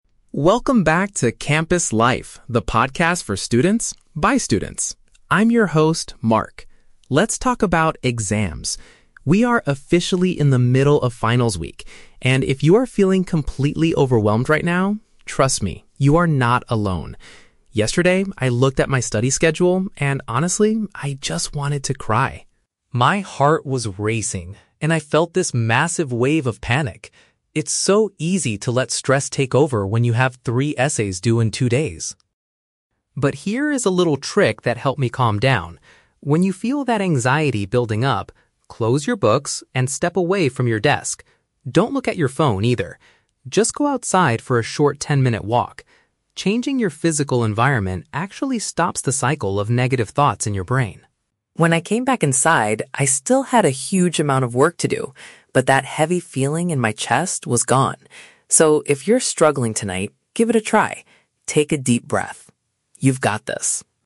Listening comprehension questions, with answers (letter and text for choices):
Listen to the podcast episode about exam stress. Choose the correct answer (A, B, or C) for each question.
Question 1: How did Mark react when he checked his study plan yesterday?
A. He experienced a sudden and strong sense of fear.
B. He felt angry because he had to write three essays.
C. He started crying because he forgot his assignments.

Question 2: What is Mark's main advice for students who feel anxious?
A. Stop using their mobile phones while doing homework.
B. Leave their current location to spend time outdoors.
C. Talk to another student who is also feeling negative.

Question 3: How did Mark feel after he followed his own advice?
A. He was happy because he had finished all of his essays.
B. He felt physically and mentally relieved from the pressure.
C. He was still panicked about the amount of work he had left.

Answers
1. A. He experienced a sudden and strong sense of fear.
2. B. Leave their current location to spend time outdoors.
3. B. He felt physically and mentally relieved from the pressure.

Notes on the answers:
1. Mark says, "My heart was racing, and I felt this massive wave of panic." A massive wave of panic is a paraphrase for a sudden and strong sense of fear. The Trap (B): The audio mentions having "three essays due," but Mark felt panicked and overwhelmed, not angry at anyone. The Trap (C): Mark says, "I just wanted to cry," which means he felt like crying, but he didn't actually start crying or forget his assignments.
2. Mark advises students to "step away from your desk... Just go outside for a short ten-minute walk." This perfectly matches leaving the current location to spend time outdoors. The Trap (A): Mark does say "Don't look at your phone," but this is just a minor detail during the walk. It is not the main advice or trick, which is changing the physical environment. The Plausible (C): Talking to someone is a great way to handle stress, but Mark never mentions talking to other students in his advice.
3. Mark says that after his walk, "that heavy feeling in my chest was gone." This is a metaphorical way of saying he felt relieved from the emotional and physical pressure. The Trap (A): Mark clearly states, "I still had a huge amount of work to do." He had not finished his essays yet. The Trap (C): Even though he still had work to do, he was no longer panicked because the "heavy feeling... was gone."

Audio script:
Mark (Podcast Host): Welcome back to 'Campus Life,' the podcast for students, by students. I'm your host, Mark. Let's talk about exams. We are officially in the middle of finals week, and if you are feeling completely overwhelmed right now, trust me, you are not alone. Yesterday, I looked at my study schedule and honestly, I just wanted to cry. My heart was racing, and I felt this massive wave of panic. It's so easy to let stress take over when you have three essays due in two days.
But here is a little trick that helped me calm down. When you feel that anxiety building up, close your books and step away from your desk. Don't look at your phone, either. Just go outside for a short ten-minute walk. Changing your physical environment actually stops the cycle of negative thoughts in your brain. When I came back inside, I still had a huge amount of work to do, but that heavy feeling in my chest was gone. So, if you're struggling tonight, give it a try. Take a deep breath. You've got this.